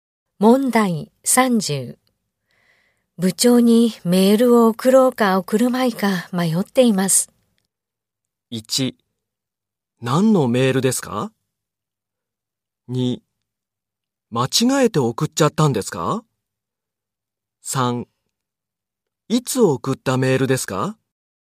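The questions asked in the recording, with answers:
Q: 部長にメールを送ろうか送るまいか迷っています。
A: 1: 何のメールですか?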